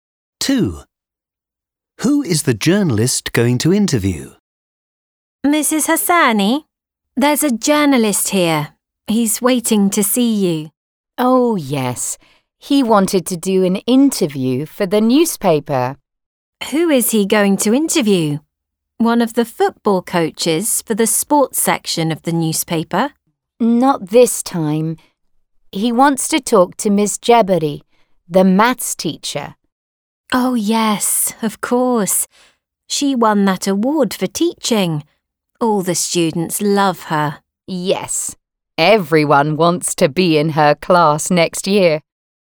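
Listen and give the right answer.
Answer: Miss Jebari, the maths teacher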